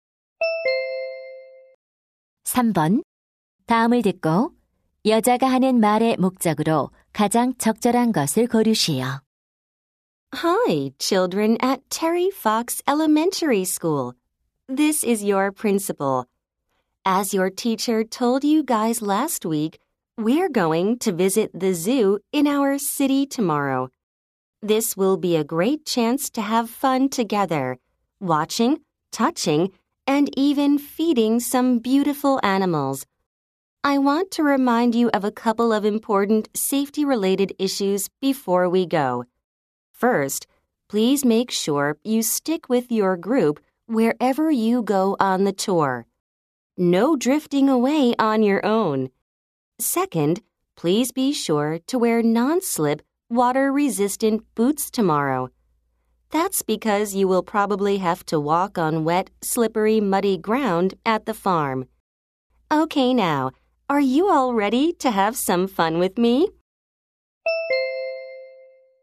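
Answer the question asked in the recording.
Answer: 내일 동물원 견학 전에 안전 관련 주의사항을 알리려고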